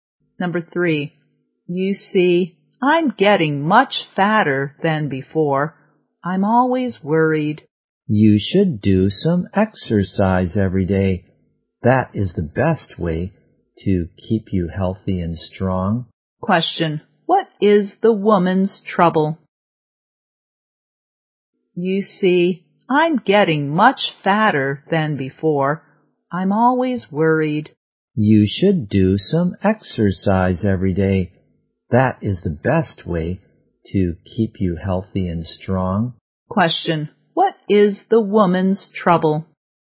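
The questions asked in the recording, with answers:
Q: What is the woman's trouble?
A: She is getting much fatter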